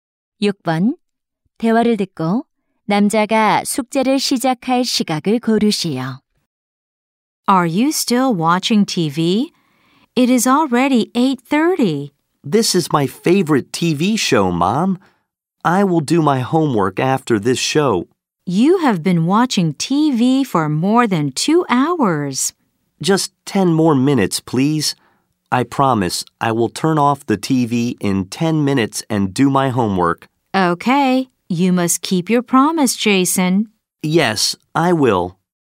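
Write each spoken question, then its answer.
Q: 대화를 듣고 남자가 숙제를 시작할 시각을 고르시오.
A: 8시 40분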